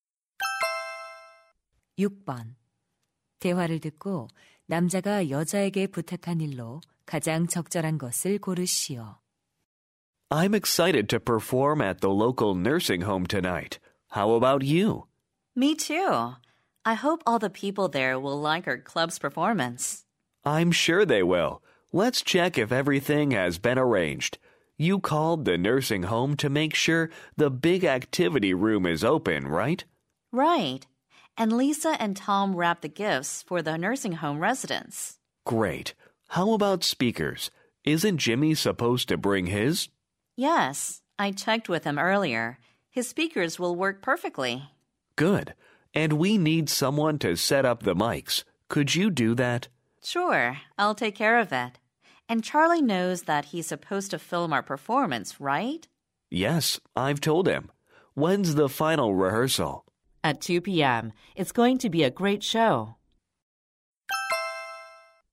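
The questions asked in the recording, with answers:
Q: 대화를 듣고 남자가 여자에게 부탁한 일로 가장 적절한 것을 고르시오.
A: 마이크 설치하기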